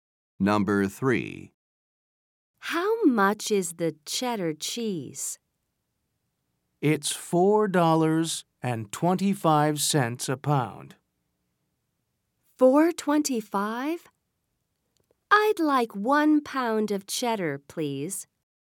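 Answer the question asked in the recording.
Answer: $4.25 a pound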